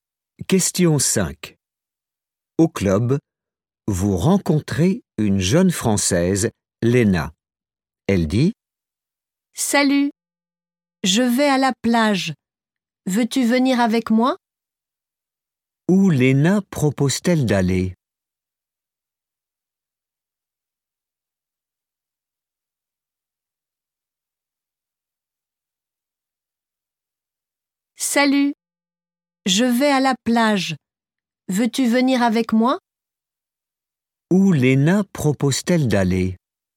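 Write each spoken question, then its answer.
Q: Où Léna propose-t-elle d'aller?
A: à la plage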